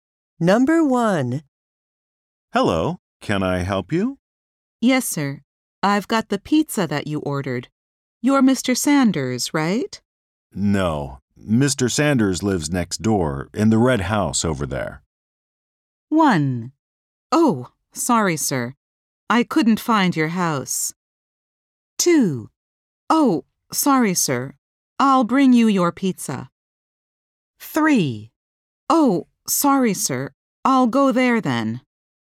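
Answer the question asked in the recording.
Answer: 3: Oh, sorry, sir. I'll go there then.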